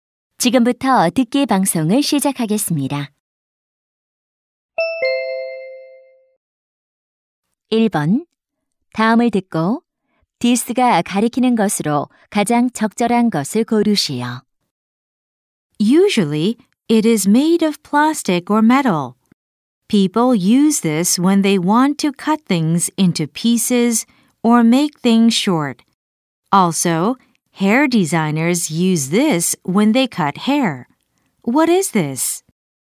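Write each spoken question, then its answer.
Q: 다음을 듣고 디스가 가리키는 것으로 가장 적절한 것을 고르시오.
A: 가위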